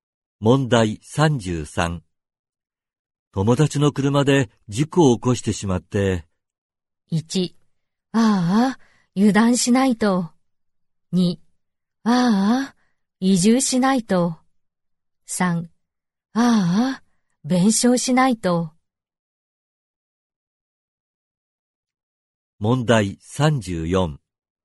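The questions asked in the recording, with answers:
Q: 友達の車で事故を起こしてしまって。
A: 3: ああ、弁償しないと。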